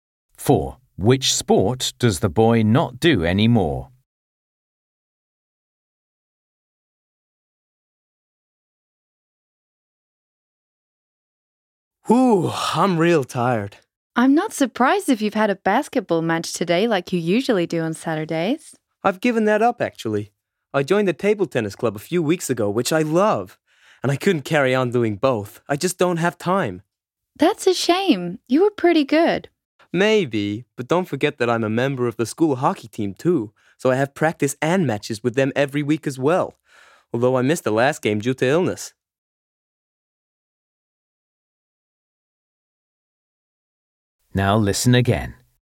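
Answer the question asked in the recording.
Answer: Basketball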